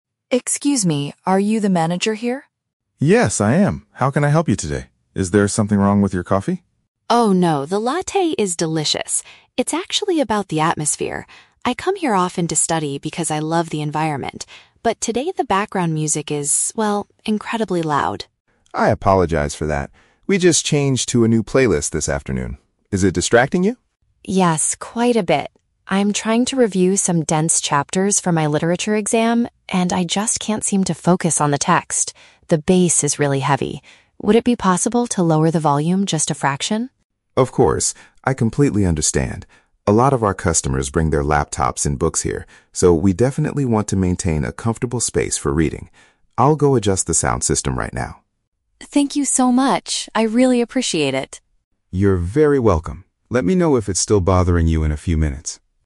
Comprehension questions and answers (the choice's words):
Listen to the conversation between a student and a cafe manager, and choose the correct answer (A, B, or C) for each question.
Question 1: What is the main reason the student speaks to the manager?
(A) To complain that her latte tastes terrible today.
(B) To request that the audio volume be reduced.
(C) To ask for a different table in a quieter corner.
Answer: To request that the audio volume be reduced.

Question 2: What is the student currently trying to do at the coffee shop?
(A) Read materials for an upcoming academic test.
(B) Listen to a newly released playlist on her laptop.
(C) Write an essay about the heavy bass music.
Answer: Read materials for an upcoming academic test.

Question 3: How does the manager react to the student's request?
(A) He refuses because other customers enjoy the energetic environment.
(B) He offers to give her a free beverage to apologize for the inconvenience.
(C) He agrees to modify the settings on the audio equipment immediately.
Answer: He agrees to modify the settings on the audio equipment immediately.

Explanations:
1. Sarah says, "the background music is... incredibly loud" and asks, "Would it be possible to lower the volume...?" Option B perfectly paraphrases this. Option A is a trap; the manager asks if something is wrong with the coffee, but Sarah explicitly says, "Oh, no, the latte is delicious." Option C is a logical solution in real life, but it is not mentioned in the conversation.
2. Sarah states she is trying to "review some dense chapters for my literature exam." Option A paraphrases "review chapters" as "read materials" and "literature exam" as "academic test." Option B is a trap; the manager mentions a "new playlist" and "laptops" are mentioned later, but Sarah is not listening to a playlist on her laptop. Option C is a trap; she mentions "heavy bass," but she isn't writing an essay about it.
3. David says he completely understands and will "go adjust the sound system right now." Option C perfectly paraphrases this as agreeing to "modify the settings on the audio equipment." Option A is a trap; he mentions other customers, but says they also bring books, so he agrees to turn it down, not refuse. Option B is plausible for customer service but is never mentioned.

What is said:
Sarah: Excuse me, are you the manager here?
David: Yes, I am. How can I help you today? Is there something wrong with your coffee?
Sarah: Oh, no, the latte is delicious. It's actually about the atmosphere. I come here often to study because I love the environment, but today the background music is, well, incredibly loud.
David: I apologize for that. We just changed to a new playlist this afternoon. Is it distracting you?
Sarah: Yes, quite a bit. I'm trying to review some dense chapters for my literature exam, and I just can't seem to focus on the text. The bass is really heavy. Would it be possible to lower the volume just a fraction?
David: Of course. I completely understand. A lot of our customers bring their laptops and books here, so we definitely want to maintain a comfortable space for reading. I'll go adjust the sound system right now.
Sarah: Thank you so much, I really appreciate it.
David: You're very welcome. Let me know if it's still bothering you in a few minutes.